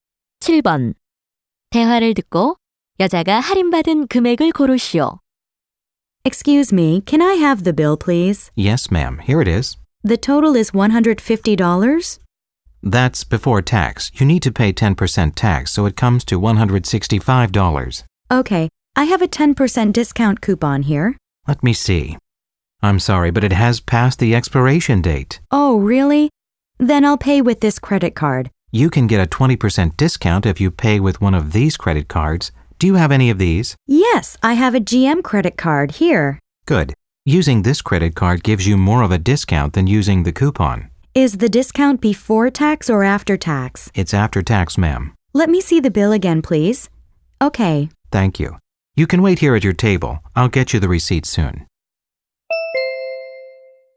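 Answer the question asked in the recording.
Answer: 33달러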